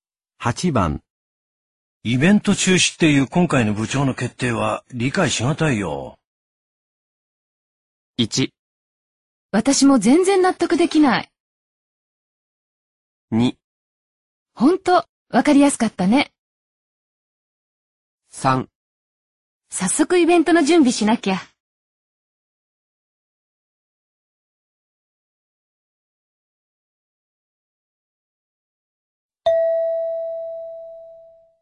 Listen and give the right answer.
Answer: 1

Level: N2